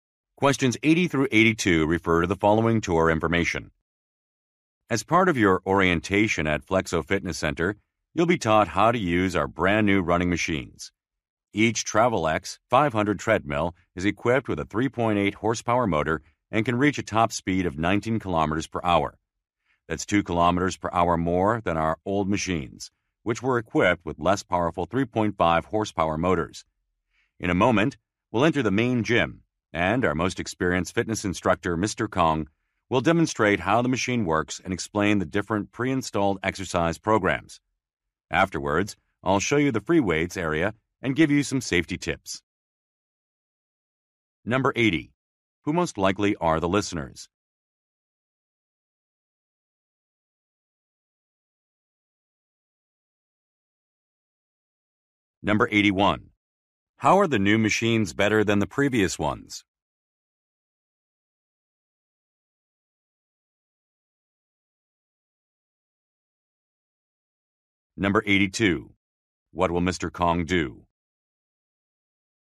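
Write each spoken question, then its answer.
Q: Who most likely are the listeners?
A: New members of a fitness center

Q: How are the new machines better than the previous ones?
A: They are faster, with more powerful motors

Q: What will Mr. Kong do?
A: Demonstrate how the machine works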